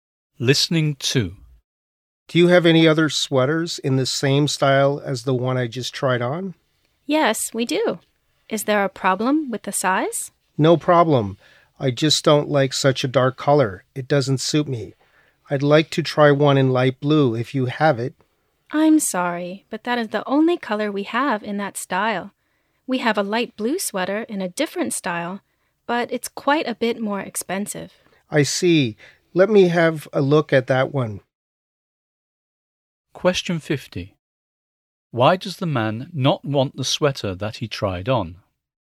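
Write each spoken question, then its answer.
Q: Why does the man not want the sweater that he tried on?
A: He doesn't like the dark color; it doesn't suit him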